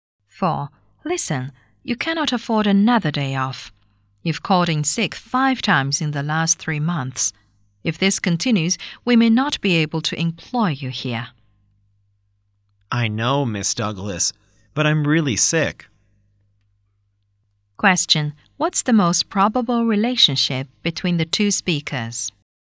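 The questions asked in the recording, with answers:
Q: What's the most probable relationship between the two speakers?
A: Employer and employee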